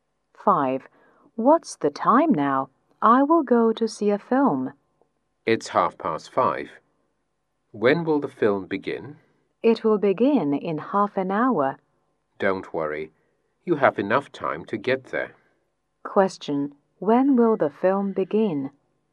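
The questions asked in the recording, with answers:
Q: When will the film begin?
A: At 6:00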